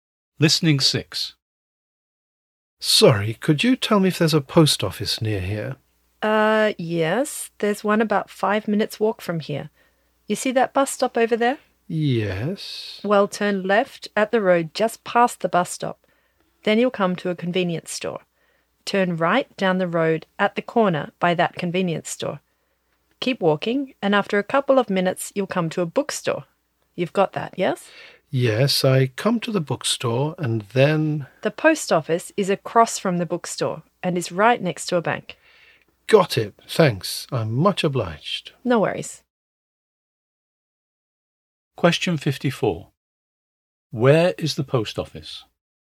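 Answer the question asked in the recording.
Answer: Across from the bookstore, next to a bank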